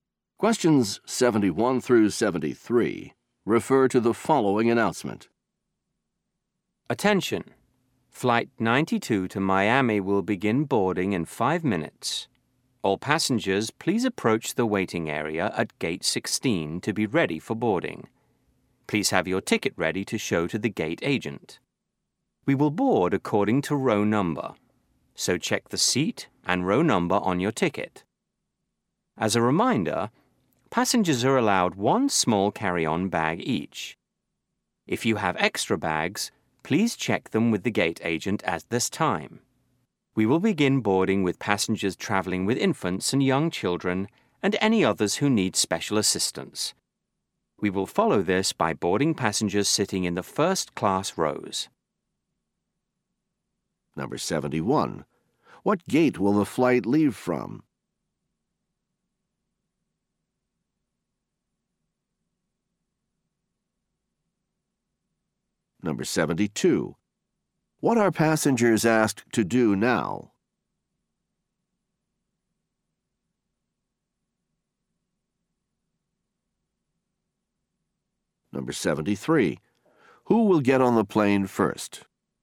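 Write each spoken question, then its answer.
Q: What gate will the flight leave from?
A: Gate 16

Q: What are passengers asked to do now?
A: Go to the waiting area at gate 16

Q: Who will get on the plane first?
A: Passengers with infants and young children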